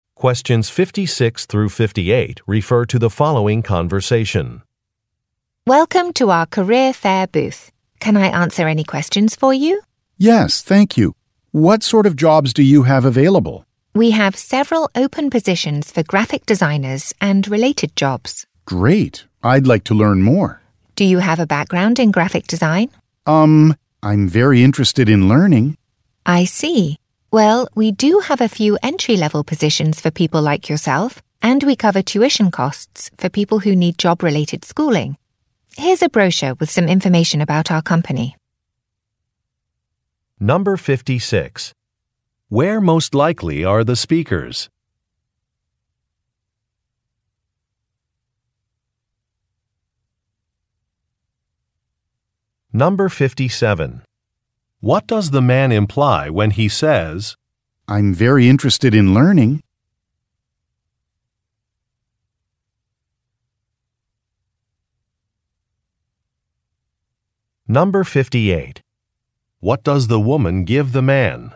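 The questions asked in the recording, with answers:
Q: Where most likely are the speakers?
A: At a career fair

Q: What does the man imply when he says, I'm very interested in learning?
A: He does not have a background in graphic design

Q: What does the woman give the man?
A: A brochure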